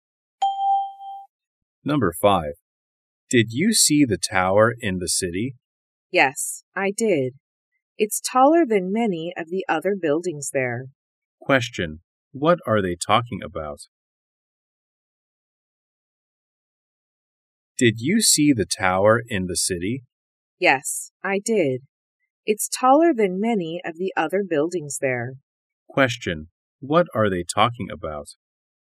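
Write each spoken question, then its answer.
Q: What are they talking about?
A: A tower in the city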